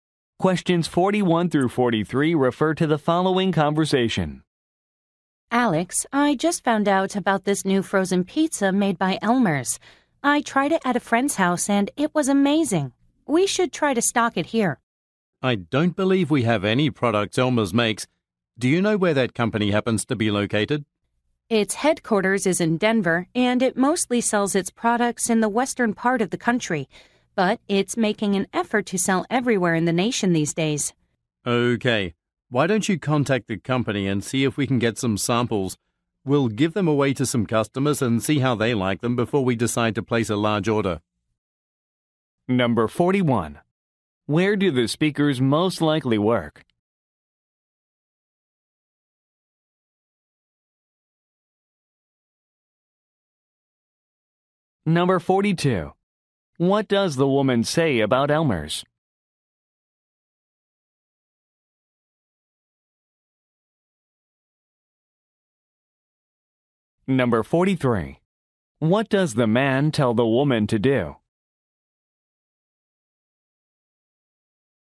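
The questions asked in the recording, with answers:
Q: Where do the speakers most likely work?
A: At a grocery store

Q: What does the woman say about Elmer's?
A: It is trying to sell its products nationwide

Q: What does the man tell the woman to do?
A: Contact the company to get samples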